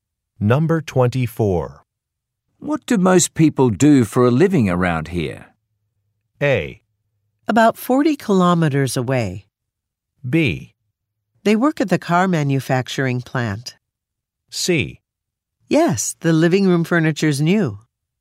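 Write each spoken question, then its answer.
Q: What do most people do for a living around here?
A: B: They work at the car manufacturing plant.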